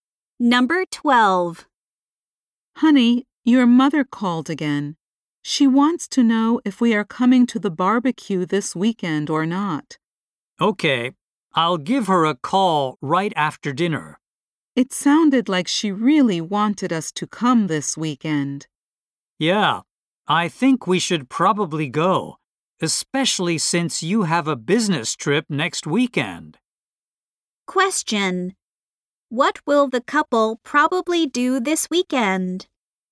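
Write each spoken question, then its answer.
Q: What will the couple probably do this weekend?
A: Go to the barbecue at his mother's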